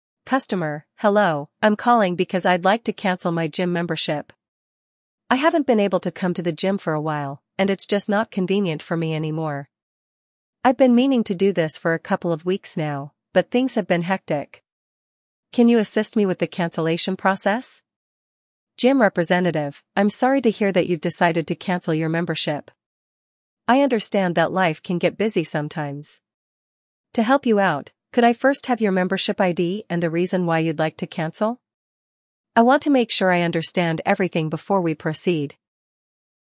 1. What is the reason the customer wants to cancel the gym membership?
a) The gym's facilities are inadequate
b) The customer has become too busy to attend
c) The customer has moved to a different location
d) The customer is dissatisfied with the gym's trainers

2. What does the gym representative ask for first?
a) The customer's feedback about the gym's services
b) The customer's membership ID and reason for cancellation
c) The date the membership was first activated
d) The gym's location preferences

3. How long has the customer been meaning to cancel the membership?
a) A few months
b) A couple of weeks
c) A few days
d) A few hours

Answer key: 1b, 2b, 3b

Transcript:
Customer: "Hello, I'm calling because I'd like to cancel my gym membership. I haven't been able to come to the gym for a while, and it's just not convenient for me anymore. I've been meaning to do this for a couple of weeks now, but things have been hectic. Can you assist me with the cancellation process?"
Gym Representative: "I'm sorry to hear that you've decided to cancel your membership. I understand that life can get busy sometimes. To help you out, could I first have your membership ID and the reason why you'd like to cancel? I want to make sure I understand everything before we proceed."

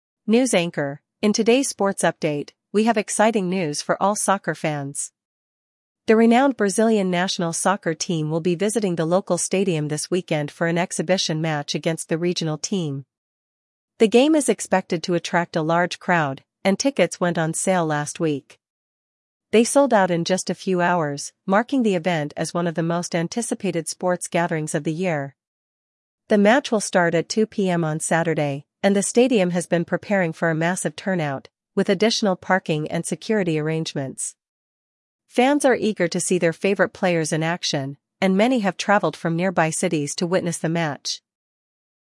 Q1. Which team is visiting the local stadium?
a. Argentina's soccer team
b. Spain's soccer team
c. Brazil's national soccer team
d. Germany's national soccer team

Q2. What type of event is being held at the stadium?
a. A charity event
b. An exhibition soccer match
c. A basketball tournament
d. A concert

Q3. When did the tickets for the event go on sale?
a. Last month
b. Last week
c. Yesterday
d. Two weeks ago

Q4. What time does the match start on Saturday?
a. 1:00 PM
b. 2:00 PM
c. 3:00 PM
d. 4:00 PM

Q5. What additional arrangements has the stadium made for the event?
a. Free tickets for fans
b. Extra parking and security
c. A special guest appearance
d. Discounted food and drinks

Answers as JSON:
{"1": "c", "2": "b", "3": "b", "4": "b", "5": "b"}

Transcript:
News Anchor: "In today's sports update, we have exciting news for all soccer fans. The renowned Brazilian national soccer team will be visiting the local stadium this weekend for an exhibition match against the regional team. The game is expected to attract a large crowd, and tickets went on sale last week. They sold out in just a few hours, marking the event as one of the most anticipated sports gatherings of the year. The match will start at 2:00 PM on Saturday, and the stadium has been preparing for a massive turnout, with additional parking and security arrangements. Fans are eager to see their favorite players in action, and many have traveled from nearby cities to witness the match."

